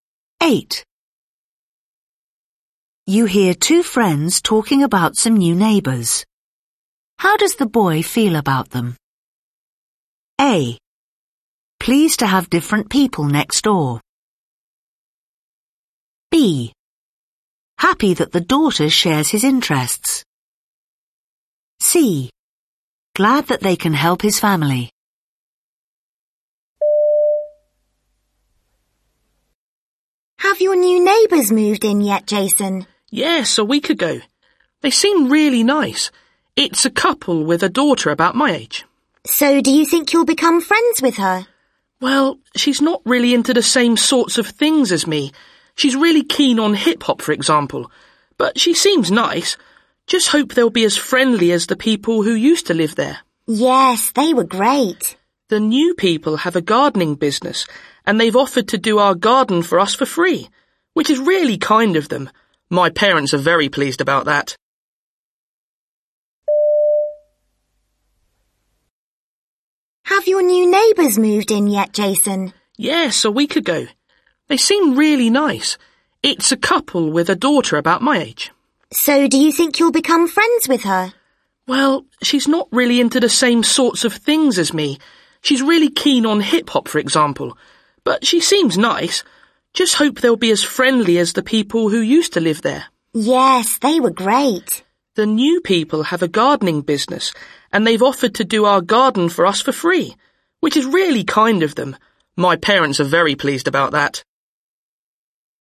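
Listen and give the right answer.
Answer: C: Glad that they can help his family.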